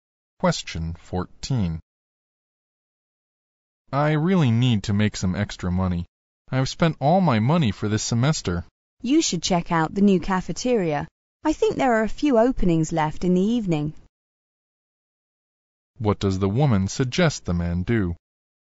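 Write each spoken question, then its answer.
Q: What does the woman suggest the man do?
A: Apply for an evening job at the new cafeteria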